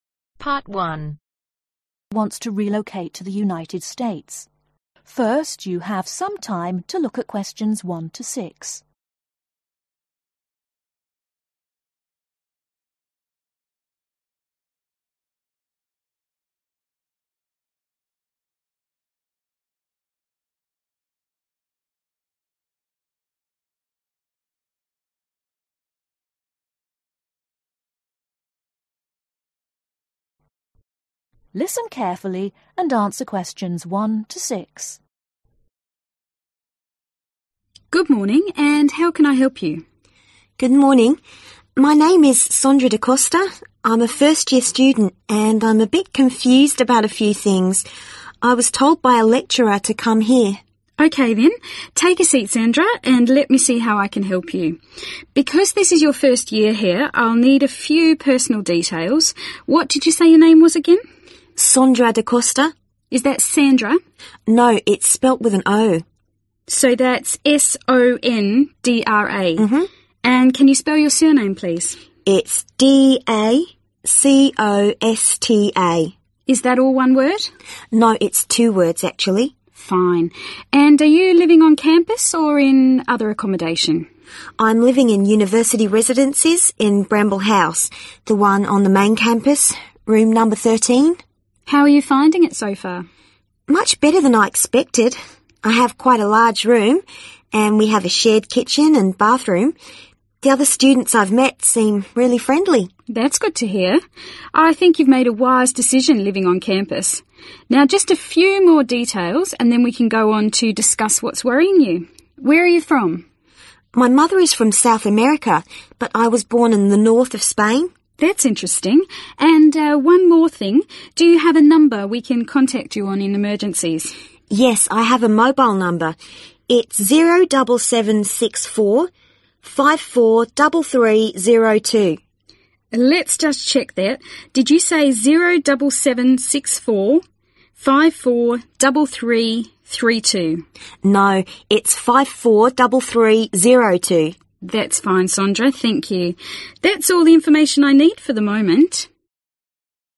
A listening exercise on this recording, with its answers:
Complete the notes below. Write NO MORE THAN ONE WORD for each answer.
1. What year is the student in ?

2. How is the student feeling ?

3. Name: 3 ...............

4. Room No 4 ..............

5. Nationality: 5 ..............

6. Emergency Contact Number: 6 ..............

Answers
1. first
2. confused
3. Sondra
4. 13
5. Spanish
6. 07764543302